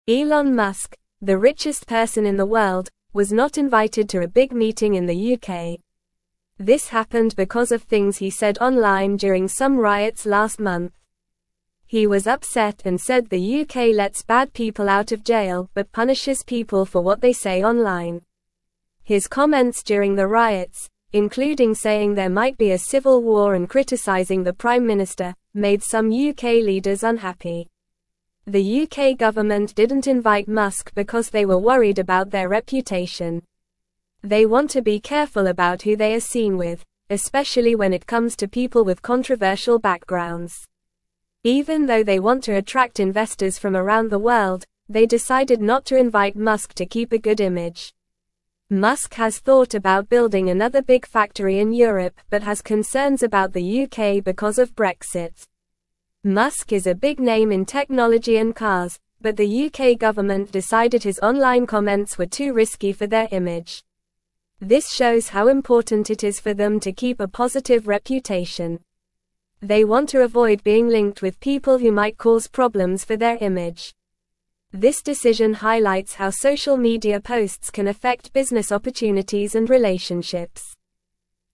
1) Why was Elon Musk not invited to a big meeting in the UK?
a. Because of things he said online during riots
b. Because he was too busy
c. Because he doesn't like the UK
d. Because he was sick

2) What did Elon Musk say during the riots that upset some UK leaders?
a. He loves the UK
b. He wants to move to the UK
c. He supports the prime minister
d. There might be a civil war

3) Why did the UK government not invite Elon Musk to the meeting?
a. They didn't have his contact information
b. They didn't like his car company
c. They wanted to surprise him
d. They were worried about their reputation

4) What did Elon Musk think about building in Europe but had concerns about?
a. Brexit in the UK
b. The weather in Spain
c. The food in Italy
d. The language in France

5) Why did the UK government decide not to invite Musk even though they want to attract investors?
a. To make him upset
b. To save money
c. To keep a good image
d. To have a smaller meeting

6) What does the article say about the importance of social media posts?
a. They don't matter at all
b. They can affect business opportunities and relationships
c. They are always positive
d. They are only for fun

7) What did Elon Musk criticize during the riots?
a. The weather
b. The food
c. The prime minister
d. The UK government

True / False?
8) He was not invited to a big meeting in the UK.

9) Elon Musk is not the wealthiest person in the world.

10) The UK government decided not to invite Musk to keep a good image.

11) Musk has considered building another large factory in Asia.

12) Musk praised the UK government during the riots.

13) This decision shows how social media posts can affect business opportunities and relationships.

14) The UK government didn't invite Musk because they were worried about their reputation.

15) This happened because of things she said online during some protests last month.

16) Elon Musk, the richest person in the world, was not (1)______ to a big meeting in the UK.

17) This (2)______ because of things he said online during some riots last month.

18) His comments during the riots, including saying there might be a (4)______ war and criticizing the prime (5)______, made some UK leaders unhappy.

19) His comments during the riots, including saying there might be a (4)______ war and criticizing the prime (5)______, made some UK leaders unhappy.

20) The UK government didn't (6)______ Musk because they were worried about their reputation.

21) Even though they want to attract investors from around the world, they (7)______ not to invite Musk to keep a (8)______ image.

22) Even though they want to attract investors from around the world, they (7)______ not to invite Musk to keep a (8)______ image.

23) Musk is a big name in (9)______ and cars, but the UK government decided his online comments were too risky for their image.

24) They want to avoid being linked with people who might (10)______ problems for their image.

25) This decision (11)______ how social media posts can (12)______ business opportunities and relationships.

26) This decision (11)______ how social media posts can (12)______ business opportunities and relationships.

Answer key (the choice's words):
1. Because of things he said online during riots
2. There might be a civil war
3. They were worried about their reputation
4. Brexit in the UK
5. To keep a good image
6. They can affect business opportunities and relationships
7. The prime minister
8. True
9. False
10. True
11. False
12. False
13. True
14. True
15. False
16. invited
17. happened
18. civil
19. minister
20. invite
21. decided
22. good
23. technology
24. cause
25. highlights
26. affect

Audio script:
Elon Musk, the richest person in the world, was not invited to a big meeting in the UK. This happened because of things he said online during some riots last month. He was upset and said the UK lets bad people out of jail but punishes people for what they say online. His comments during the riots, including saying there might be a civil war and criticizing the prime minister, made some UK leaders unhappy.
They want to be careful about who they are seen with, especially when it comes to people with controversial backgrounds. Even though they want to attract investors from around the world, they decided not to invite Musk to keep a good image. Musk has thought about building another big factory in Europe but has concerns about the UK because of Brexit.
Musk is a big name in technology and cars, but the UK government decided his online comments were too risky for their image. This shows how important it is for them to keep a positive reputation. They want to avoid being linked with people who might cause problems for their image. This decision highlights how social media posts can affect business opportunities and relationships.

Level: Level 2